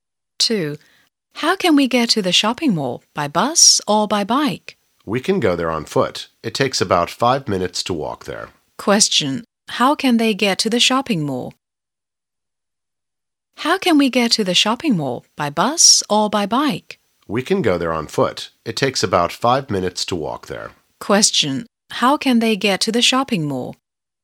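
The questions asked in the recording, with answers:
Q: How can they get to the shopping mall?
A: On foot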